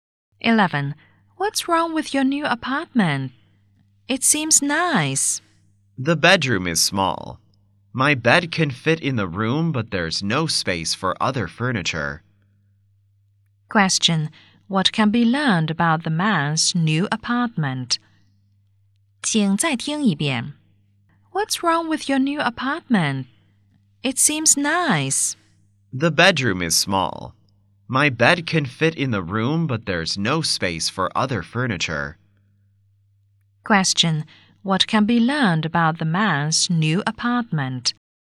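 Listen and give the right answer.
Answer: The bedroom is too small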